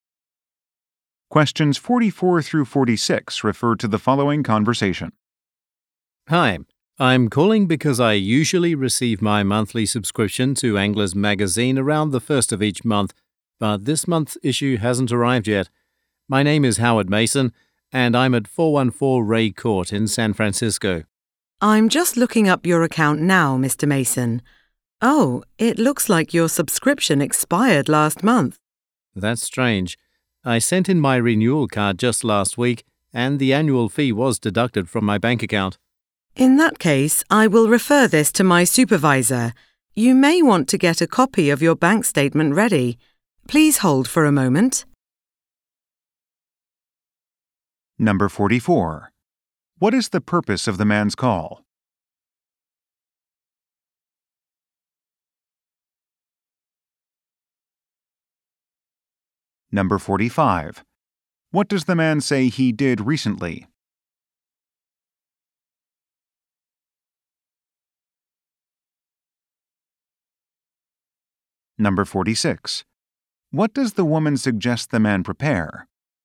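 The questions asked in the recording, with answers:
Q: What is the purpose of the man's call?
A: His magazine issue has not arrived

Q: What does the man say he did recently?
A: Sent in his renewal card

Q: What does the woman suggest the man prepare?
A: A copy of his bank statement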